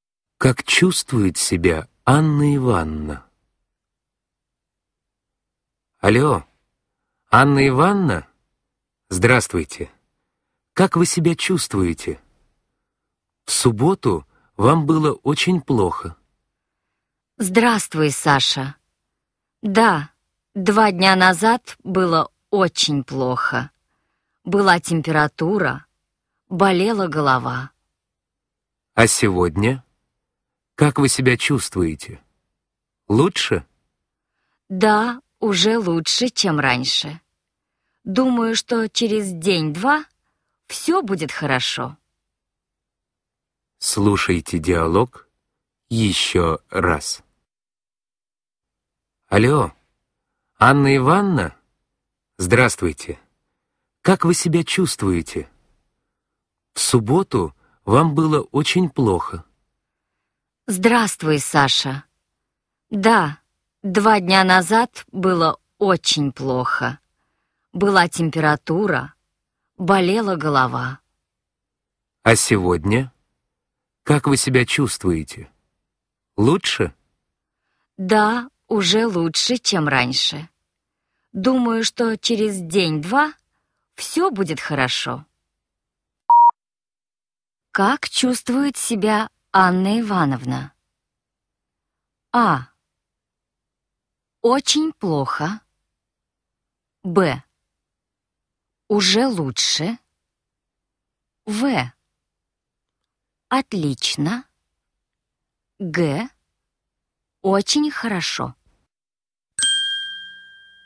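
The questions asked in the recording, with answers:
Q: Как чувствует себя Анна Ивановна?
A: Б: Уже лучше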